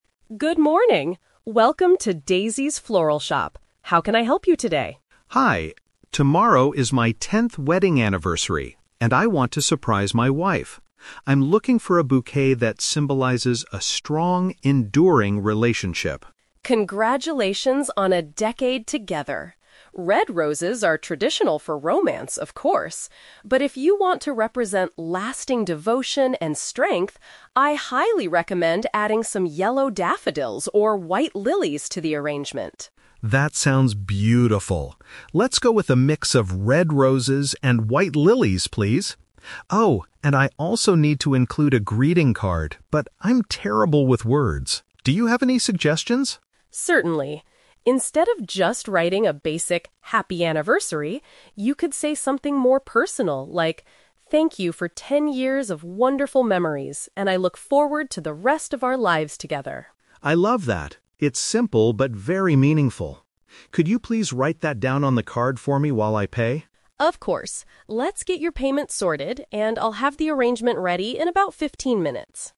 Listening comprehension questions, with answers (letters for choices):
Listen to a conversation between a customer and a florist. Choose the best answer (A, B, or C) for each question.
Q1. What is the primary message the customer wants the flowers to convey?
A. His apology for a recent disagreement.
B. His excitement for a new romantic journey.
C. His commitment and long-lasting affection.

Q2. What flower arrangement does the man finally choose?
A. A bouquet containing only traditional red roses.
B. A mixture of red and white flowers.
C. A collection of yellow daffodils.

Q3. How does the florist assist the man with the greeting card?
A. She suggests a thoughtful sentence for him to use.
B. She prints a standard "Happy Anniversary" label.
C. She offers to deliver the card to his house.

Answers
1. C
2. B
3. A

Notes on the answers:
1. The customer states he wants a bouquet that symbolizes "a strong, enduring relationship." The florist also mentions "lasting devotion." Paraphrasing: long-lasting affection = enduring relationship / lasting devotion.
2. The customer decides to go with "a mix of red roses and white lilies." Paraphrasing: red roses and white lilies = red and white flowers.
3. The customer asks for suggestions, and the florist provides a personal sentence ("Thank you for ten years of wonderful memories..."). The customer loves it and asks her to write it down.

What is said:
Florist: Good morning! Welcome to Daisy's Floral Shop. How can I help you today?
Customer: Hi. Tomorrow is my tenth wedding anniversary, and I want to surprise my wife. I'm looking for a bouquet that symbolizes a strong, enduring relationship.
Florist: Congratulations on a decade together! Red roses are traditional for romance, of course. But if you want to represent lasting devotion and strength, I highly recommend adding some yellow daffodils or white lilies to the arrangement.
Customer: That sounds beautiful. Let's go with a mix of red roses and white lilies, please. Oh, and I also need to include a greeting card, but I'm terrible with words. Do you have any suggestions?
Florist: Certainly. Instead of just writing a basic "Happy Anniversary," you could say something more personal, like, "Thank you for ten years of wonderful memories, and I look forward to the rest of our lives together."
Customer: I love that. It's simple but very meaningful. Could you please write that down on the card for me while I pay?
Florist: Of course. Let's get your payment sorted, and I'll have the arrangement ready in about fifteen minutes.